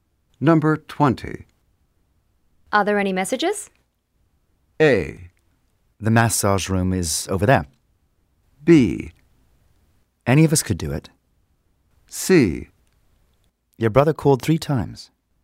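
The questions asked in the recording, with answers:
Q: Are there any messages?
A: C: Your brother called 3 times.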